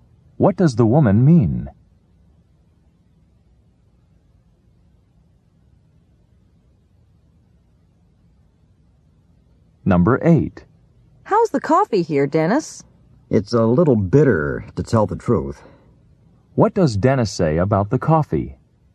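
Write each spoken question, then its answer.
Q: What does Dennis say about the coffee?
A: It's a little bitter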